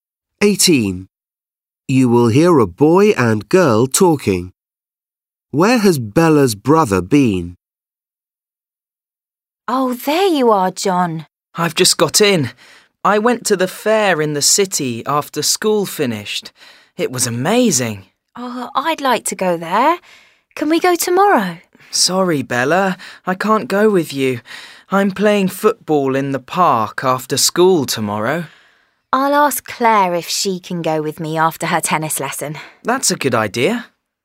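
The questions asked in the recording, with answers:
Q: Where has Bella's brother been?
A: to the fair in the city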